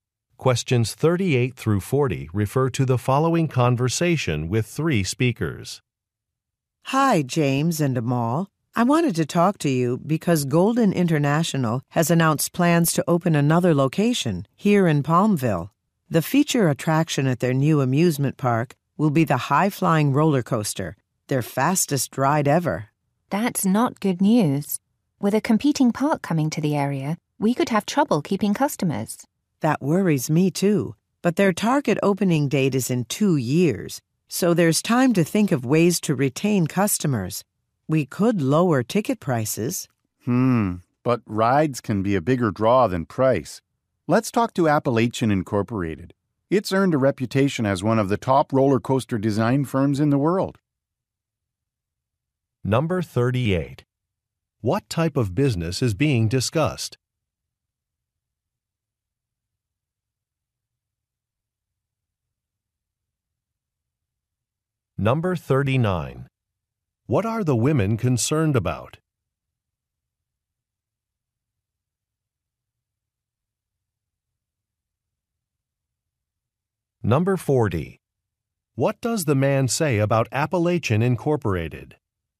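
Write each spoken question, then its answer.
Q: What type of business is being discussed?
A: An amusement park

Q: What are the women concerned about?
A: Losing customers to a competing park

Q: What does the man say about Appalachian Incorporated?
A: It is one of the top roller coaster design firms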